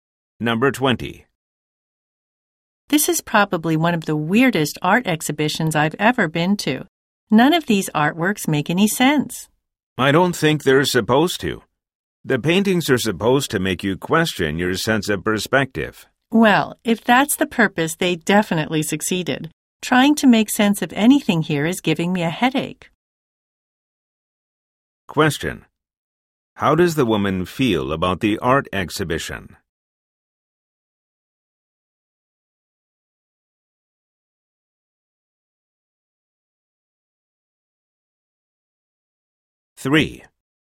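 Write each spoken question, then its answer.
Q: How does the woman feel about the art exhibition?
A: She finds it confusing; it gives her a headache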